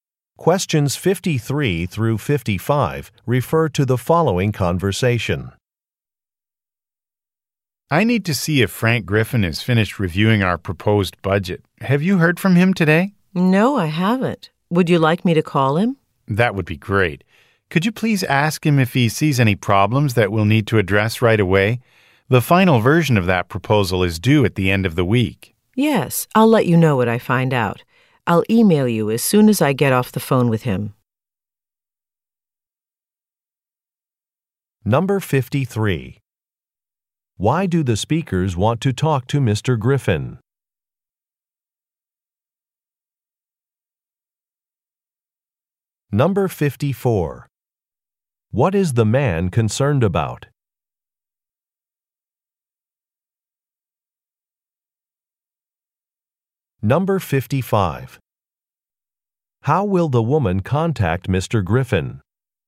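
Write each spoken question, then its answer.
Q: Why do the speakers want to talk to Mr. Griffin?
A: To see if he has finished reviewing the proposed budget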